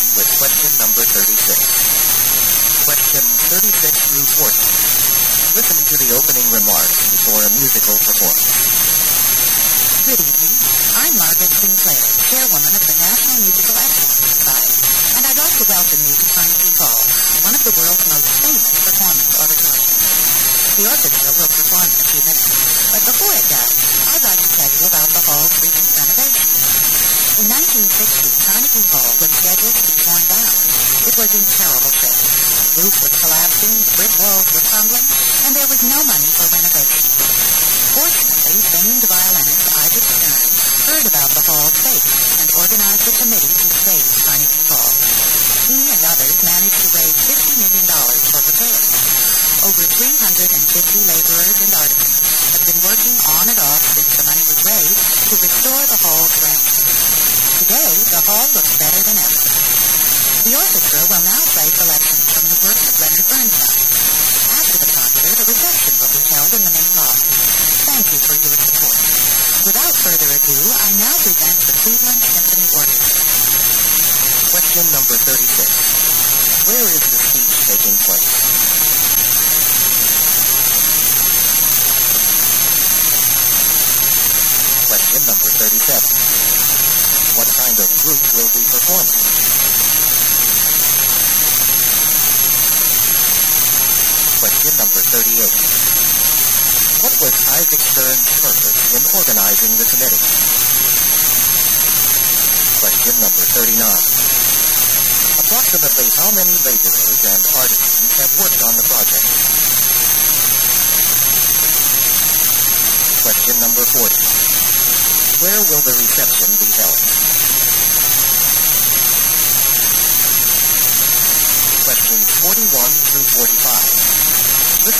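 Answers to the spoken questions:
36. Carnegie Hall
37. A symphony orchestra
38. To save Carnegie Hall from being torn down
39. Over 350
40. In the main lobby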